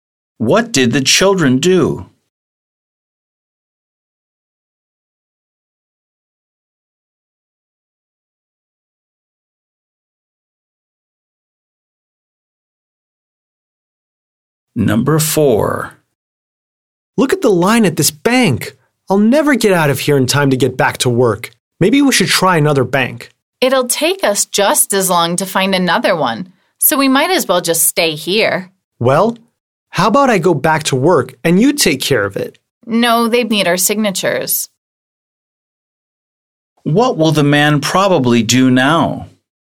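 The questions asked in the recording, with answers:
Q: What will the man probably do now?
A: Stay and wait in line at this bank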